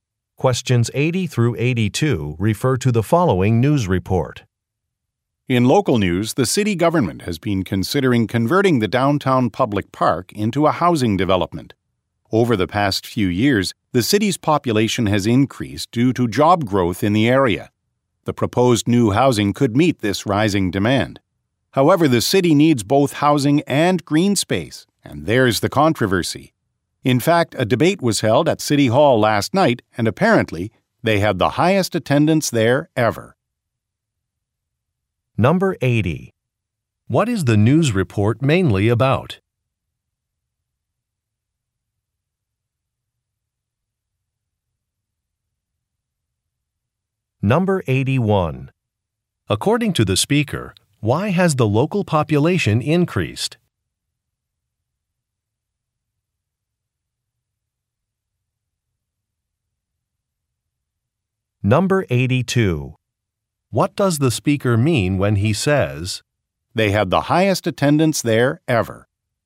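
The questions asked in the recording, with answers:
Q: What is the news report mainly about?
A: A proposal to turn a park into housing

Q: According to the speaker, why has the local population increased?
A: Job growth in the area

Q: What does the speaker mean when he says,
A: Many people are interested in the issue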